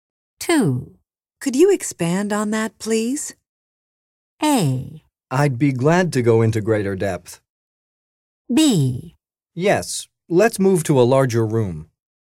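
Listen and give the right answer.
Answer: A: I'd be glad to go into greater depth.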